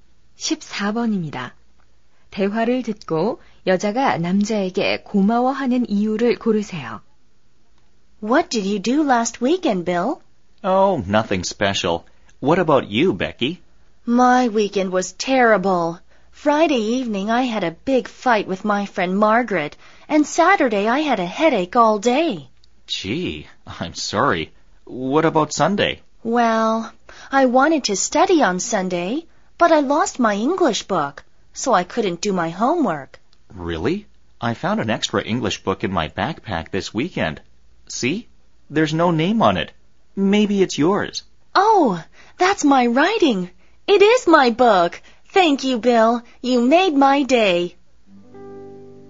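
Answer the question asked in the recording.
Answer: 잃어버린 영어책을 찾아 줘서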